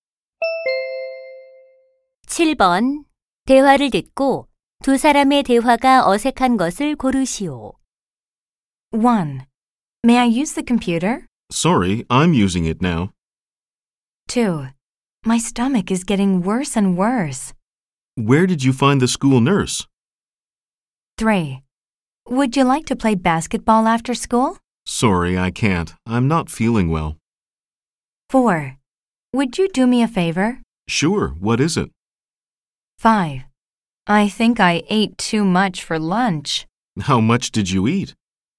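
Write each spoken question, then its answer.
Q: 대화를 듣고 두 사람의 대화가 어색한 것을 고르시오.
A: 2: My stomach is getting worse and worse. / Where did you find the school nurse?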